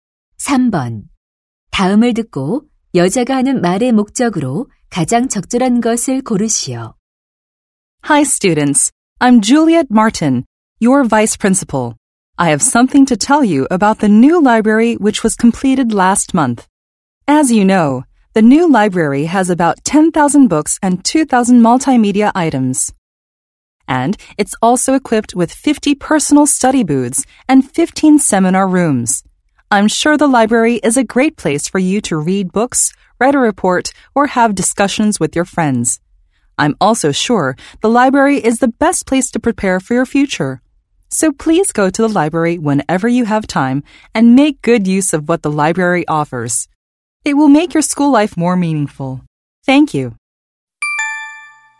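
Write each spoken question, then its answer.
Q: 다음을 듣고 여자가 하는 말의 목적으로 가장 적절한 것을 고르시오.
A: 새 도서관 이용을 권장하려고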